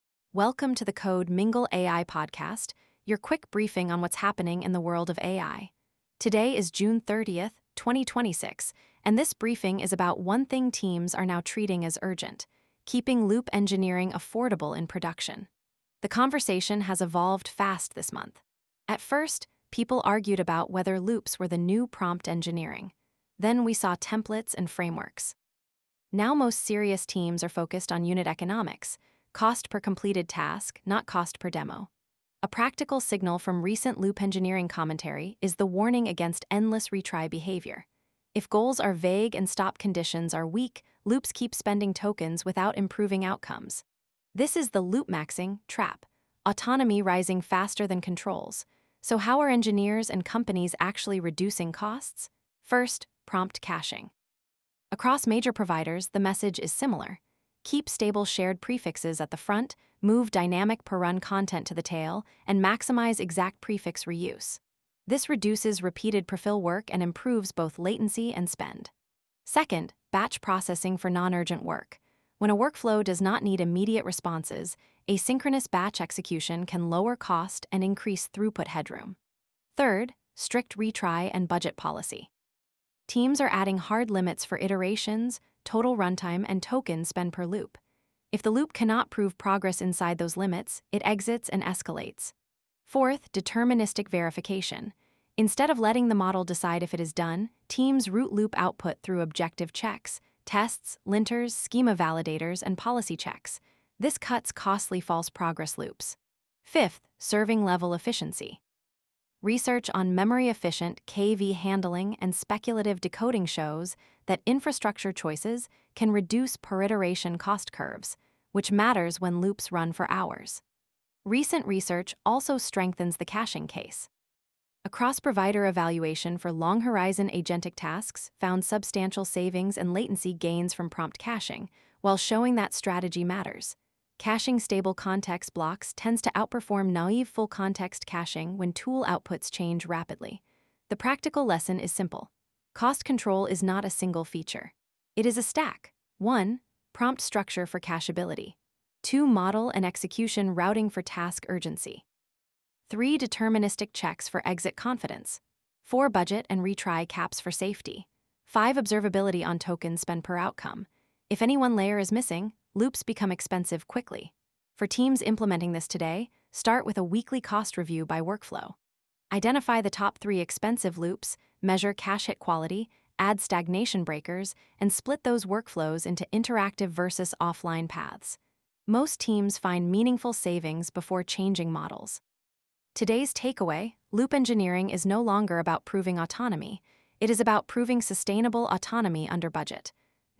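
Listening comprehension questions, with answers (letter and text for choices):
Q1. What is the main focus of the June 30 issue?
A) How to control token cost in loop-engineering systems.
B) How to write longer one-shot prompts.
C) How to remove all verification from agent loops.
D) How to avoid caching entirely.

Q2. Why does prompt structure matter for loop economics?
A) Stable prefixes improve cache reuse and reduce repeated compute.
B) It guarantees perfect model outputs.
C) It removes all token limits.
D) It eliminates the need for retries.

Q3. What is a better metric than cost per API call?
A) Cost per completed, validated outcome.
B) Total number of retries.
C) Longest loop runtime.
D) Largest context window used.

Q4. What should happen when a loop repeats identical failures?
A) Trigger a stagnation breaker and escalate.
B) Retry forever.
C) Disable logging.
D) Increase context indefinitely.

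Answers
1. A) How to control token cost in loop-engineering systems.
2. A) Stable prefixes improve cache reuse and reduce repeated compute.
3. A) Cost per completed, validated outcome.
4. A) Trigger a stagnation breaker and escalate.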